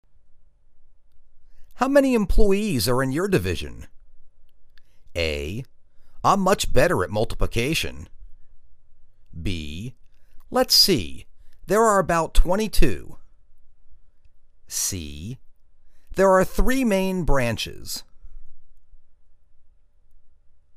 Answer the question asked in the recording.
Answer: Let's see, there are about 22.